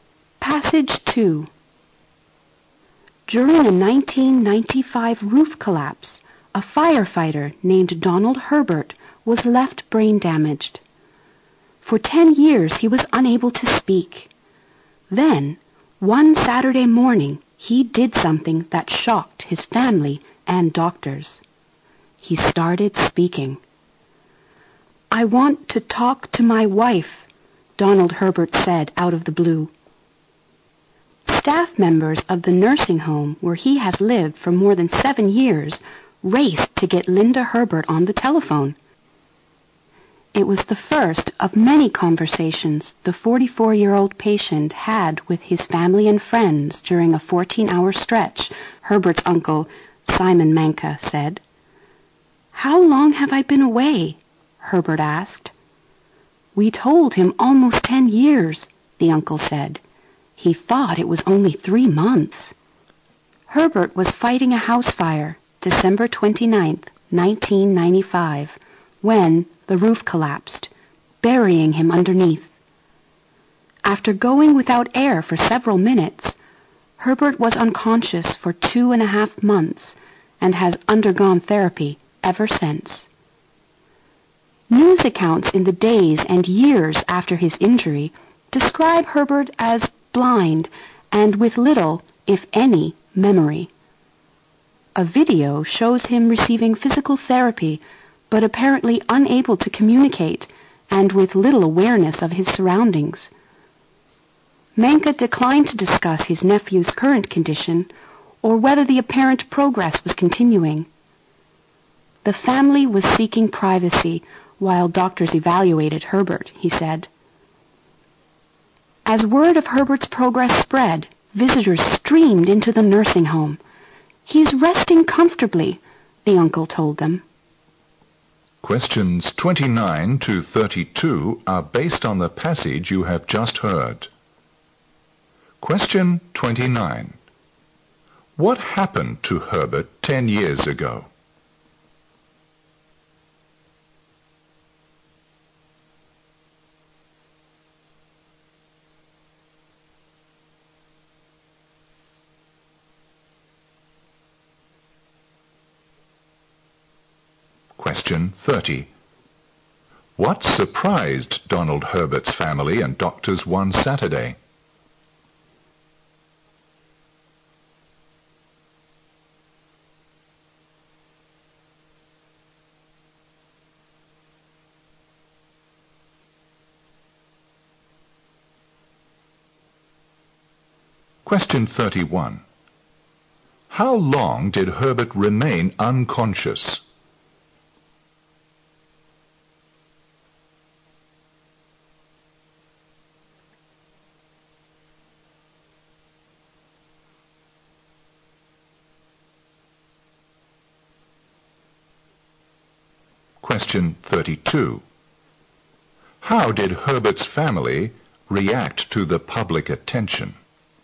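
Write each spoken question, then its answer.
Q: What happened to Herbert 10 years ago?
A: He was brain-damaged when a roof collapsed while he was fighting a fire.

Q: What surprised Donald Herbert's family and doctors one Saturday?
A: He started speaking again.

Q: How long did Herbert remain unconscious?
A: Two and a half months

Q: How did Herbert's family react to the public attention?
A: They wanted privacy.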